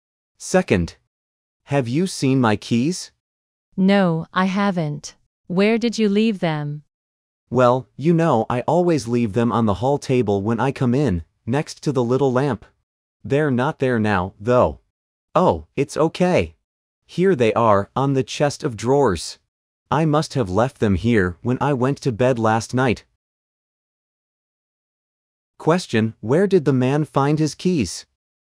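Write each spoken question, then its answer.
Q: Where did the man find his keys?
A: On the chest of drawers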